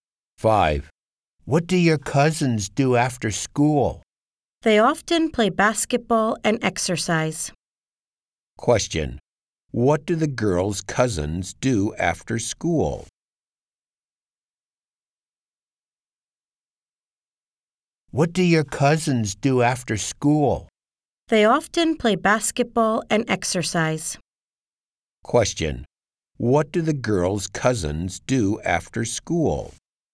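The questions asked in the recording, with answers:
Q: What do the girls' cousins do after school?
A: They often play basketball and exercise.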